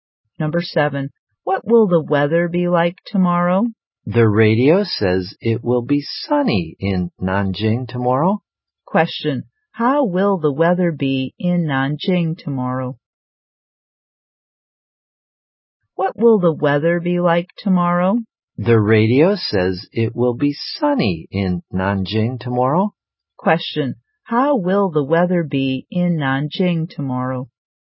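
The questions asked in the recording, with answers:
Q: Question, how will the weather be in Nanjing tomorrow?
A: Sunny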